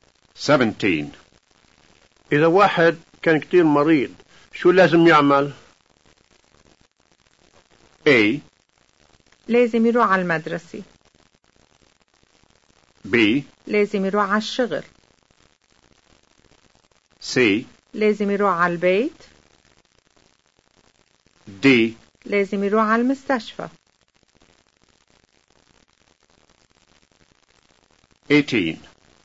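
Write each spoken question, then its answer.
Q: إذا واحد كان كتير مريض، شو لازم يعمل؟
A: D: لازم يروح على المستشفى.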